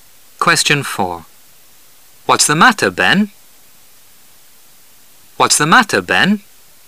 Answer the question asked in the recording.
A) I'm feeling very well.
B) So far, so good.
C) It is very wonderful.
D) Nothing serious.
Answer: D) Nothing serious.

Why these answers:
What's the matter? 是用来询问对方具体问题情况的常用句式表示,"怎么了,发生了什么事了?"。回答是要么告之具体问题,要么说明情况如何。因此悬想[D]Nothing serious"没什么大事?"。符合语境。选项[B]So far, so good"到目前为止一切顺利",是回答一般性情况的,不符合本题语境。